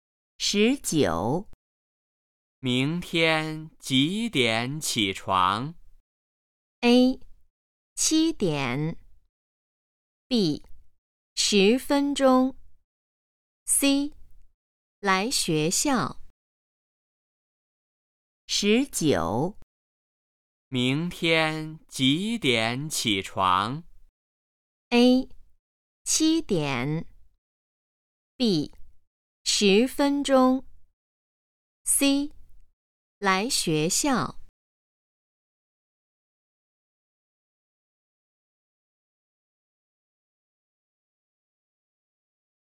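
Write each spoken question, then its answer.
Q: 明天几点起床?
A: A: 七点。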